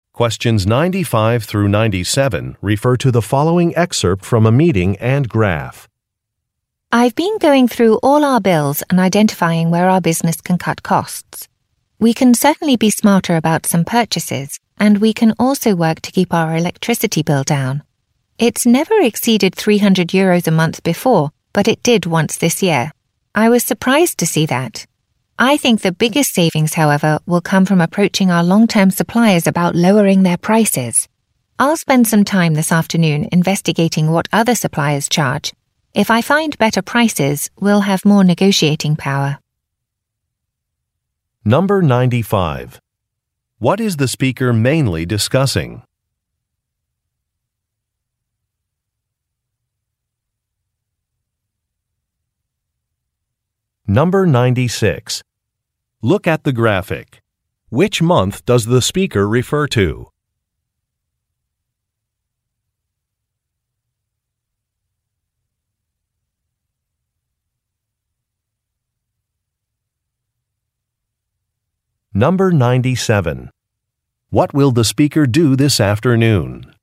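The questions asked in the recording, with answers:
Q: What is the speaker mainly discussing?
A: Ways the business can cut costs

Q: What will the speaker do this afternoon?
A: Investigate what other suppliers charge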